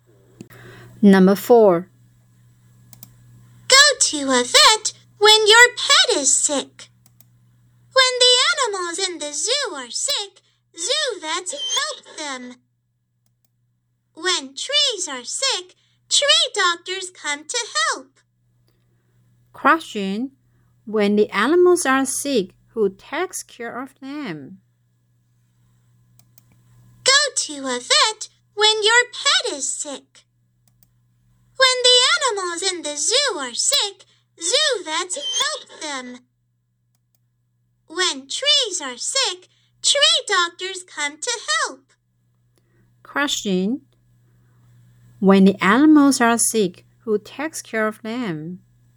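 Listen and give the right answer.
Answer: Vets (zoo vets)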